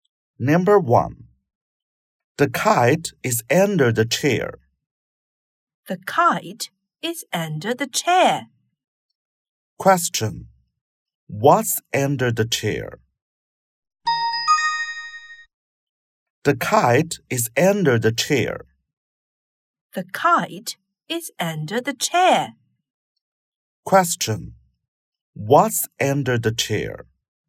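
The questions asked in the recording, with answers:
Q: What's under the chair?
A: The kite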